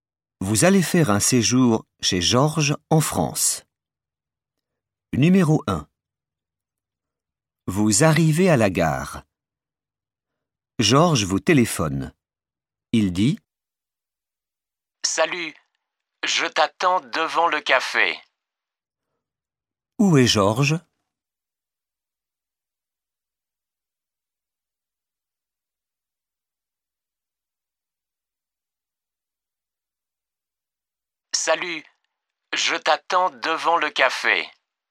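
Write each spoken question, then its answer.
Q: Où est Georges?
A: devant le café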